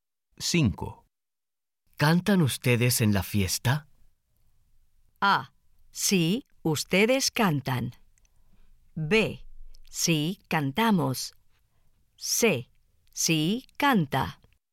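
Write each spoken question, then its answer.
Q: ¿Cantan ustedes en la fiesta?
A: B: Sí, cantamos.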